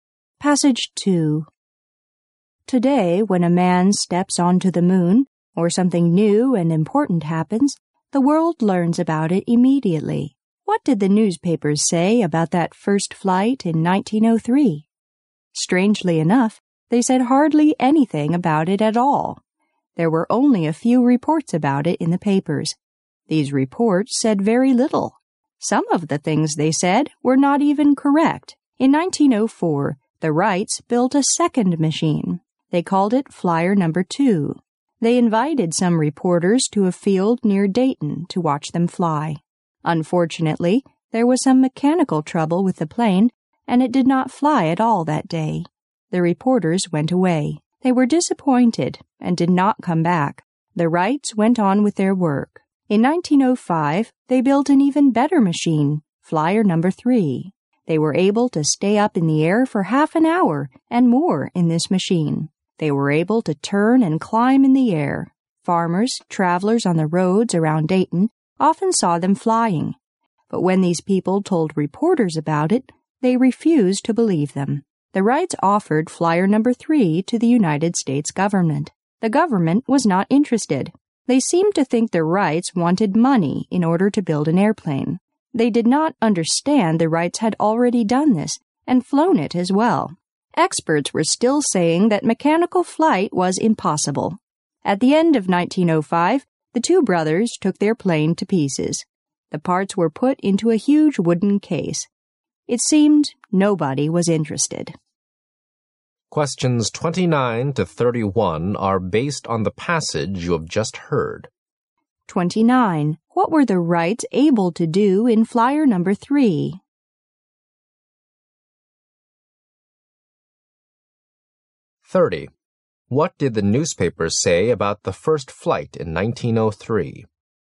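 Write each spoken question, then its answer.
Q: What were the Wrights able to do in Flyer No. 3?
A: Stay in the air for half an hour or more, turning and climbing

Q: What did the newspapers say about the first flight in 1903?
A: Hardly anything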